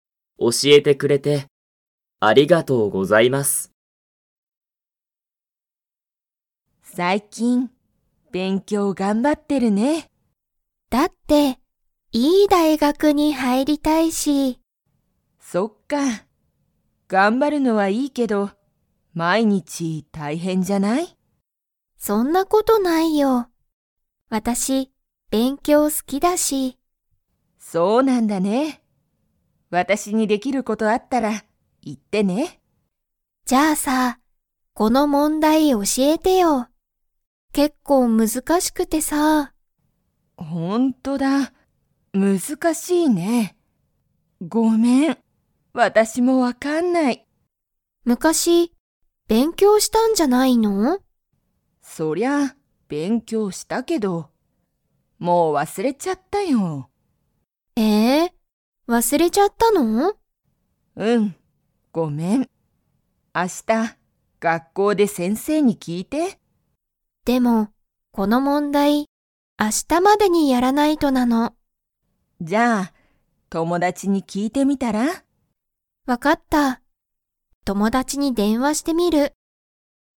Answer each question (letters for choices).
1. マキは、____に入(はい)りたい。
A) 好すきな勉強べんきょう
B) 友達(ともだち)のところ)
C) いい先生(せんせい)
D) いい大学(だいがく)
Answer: D

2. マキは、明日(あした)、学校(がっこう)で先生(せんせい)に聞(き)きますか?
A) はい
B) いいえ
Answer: B

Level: Level 2